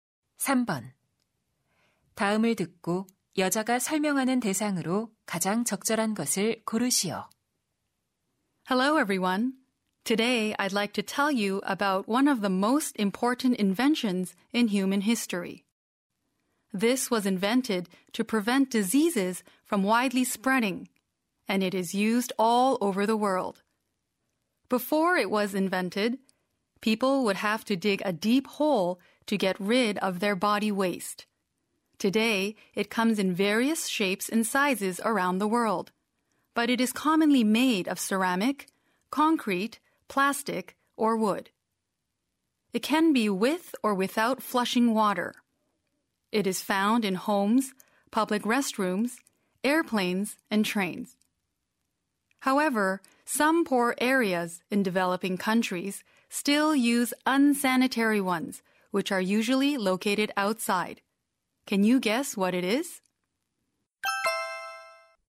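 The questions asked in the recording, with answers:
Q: 다음을 듣고 여자가 설명하는 대상으로 가장 적절한 것을 고르시오.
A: toilet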